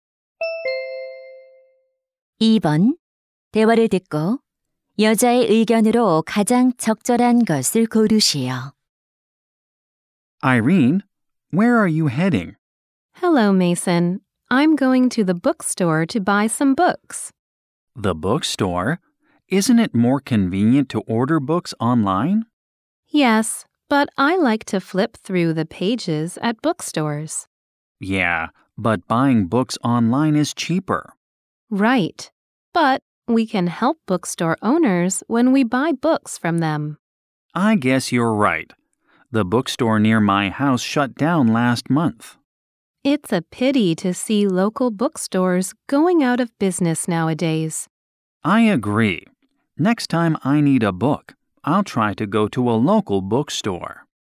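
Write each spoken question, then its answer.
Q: 대화를 듣고 여자의 의견으로 가장 적절한 것을 고르시오.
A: 지역 서점에서 책을 사는 것이 서점 주인들을 돕는다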